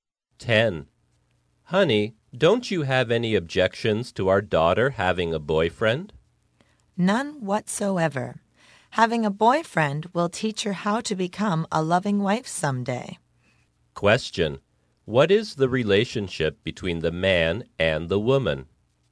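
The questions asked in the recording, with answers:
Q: What is the relationship between the man and the woman?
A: Husband and wife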